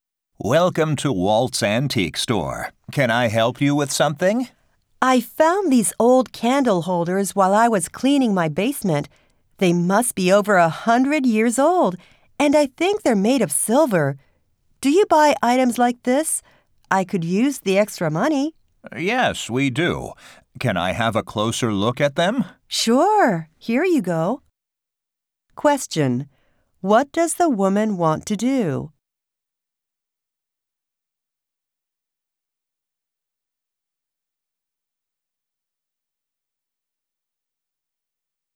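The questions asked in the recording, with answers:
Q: What does the woman want to do?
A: Sell her old candle holders to the store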